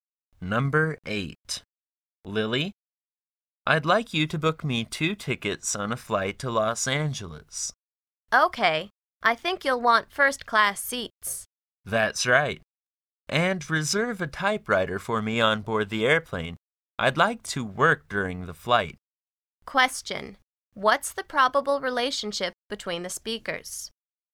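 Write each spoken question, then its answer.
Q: What's the probable relationship between the speakers?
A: Boss and secretary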